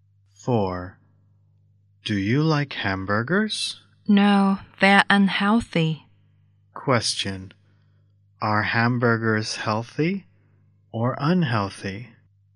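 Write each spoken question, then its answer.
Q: Question. Are hamburgers healthy or unhealthy?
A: Unhealthy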